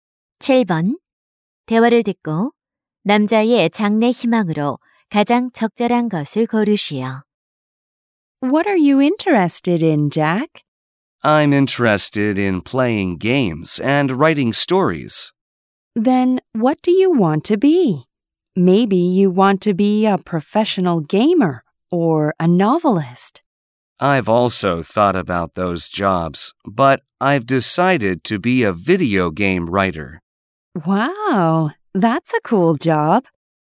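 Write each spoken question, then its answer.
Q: 대화를 듣고 남자의 장래 희망으로 가장 적절한 것을 고르시오.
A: 비디오 게임 작가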